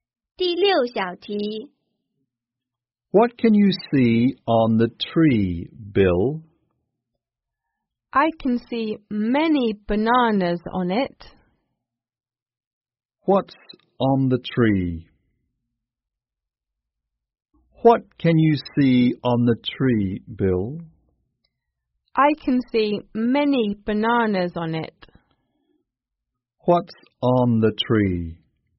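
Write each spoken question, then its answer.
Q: What's on the tree?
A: Many bananas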